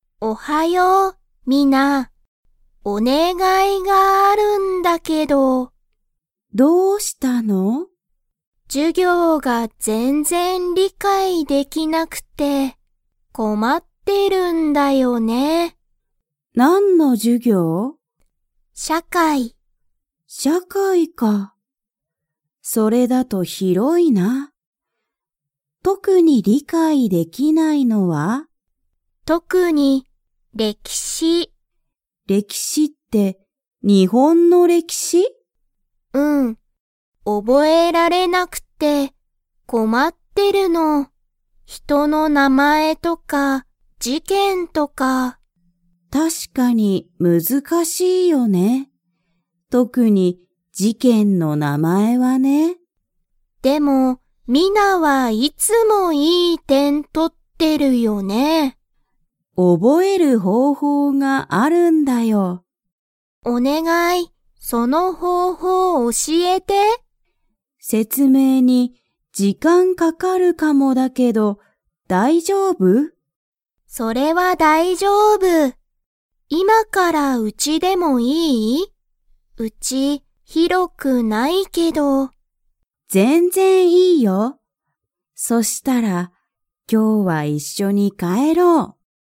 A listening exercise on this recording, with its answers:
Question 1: サエが理解りかいできないのは、何なんですか?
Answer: 歴史れきし

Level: Level 3